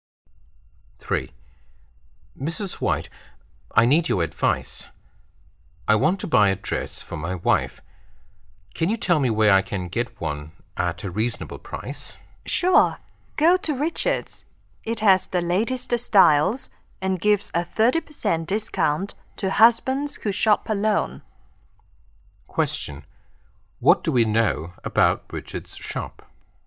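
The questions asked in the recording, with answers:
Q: What do we know about Richards' shop?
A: It has the latest styles and gives a 30% discount to husbands who shop alone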